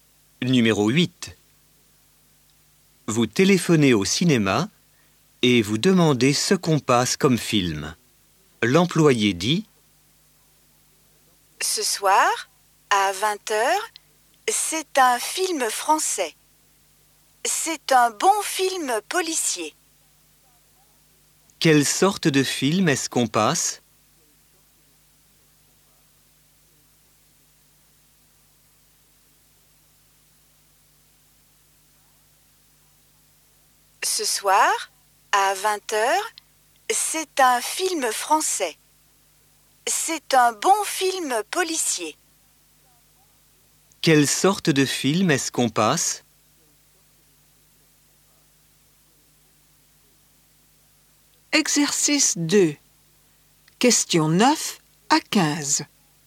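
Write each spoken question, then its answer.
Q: Quelle sorte de film est-ce qu'on passe ?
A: Un film policier français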